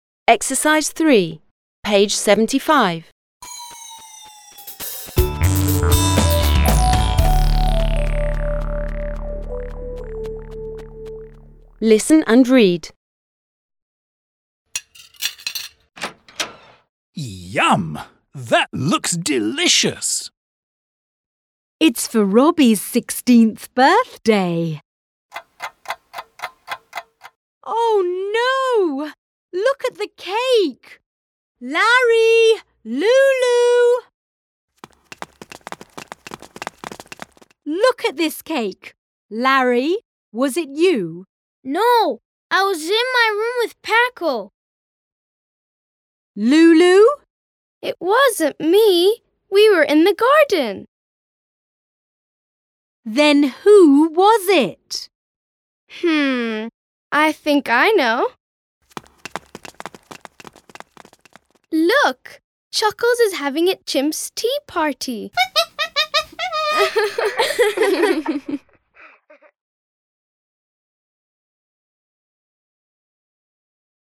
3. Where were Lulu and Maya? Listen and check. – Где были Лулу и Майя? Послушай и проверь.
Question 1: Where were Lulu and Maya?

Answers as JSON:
{"1": "Lulu and Maya were in the garden."}

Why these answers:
It wasn't me! We were in the garden! – [Ит уознт ми:! Уи: уё ин з'е га:дн!] – Это не я! Мы были в саду.

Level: 4 класс